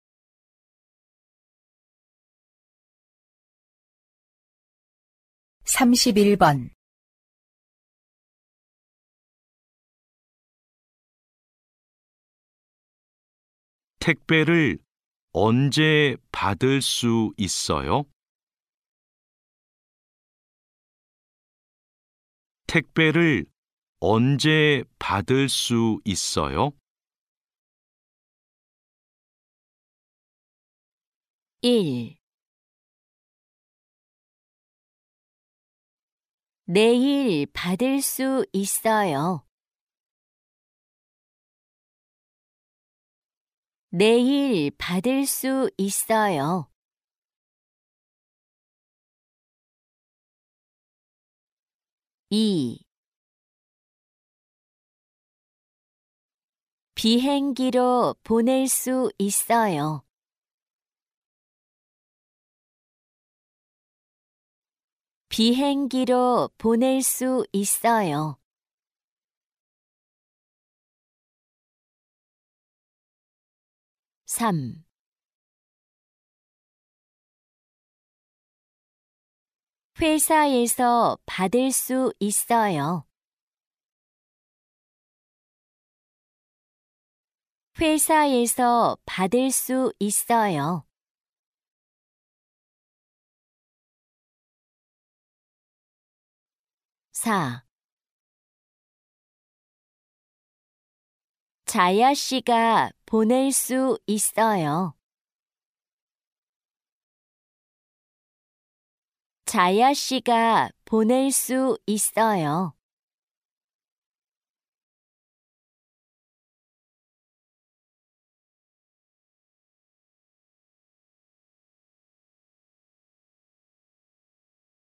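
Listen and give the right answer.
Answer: 1: 내일 받을 수 있어요.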